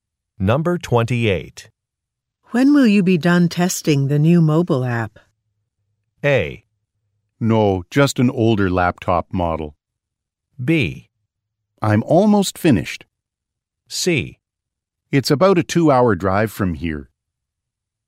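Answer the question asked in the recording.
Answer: B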